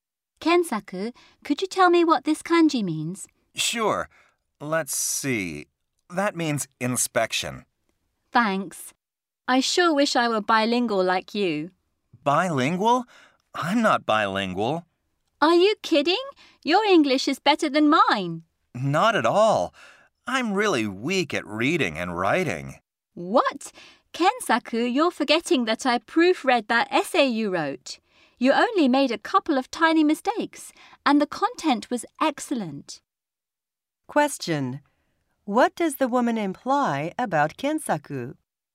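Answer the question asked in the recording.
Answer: He is too modest; his English writing is very good and he really is bilingual.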